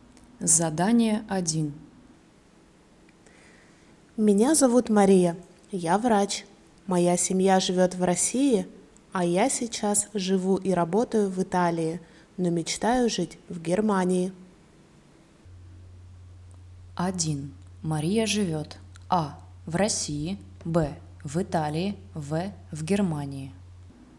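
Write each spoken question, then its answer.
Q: Мария живет А. в России, Б. в Италии, В. в Германии.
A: Б: в Италии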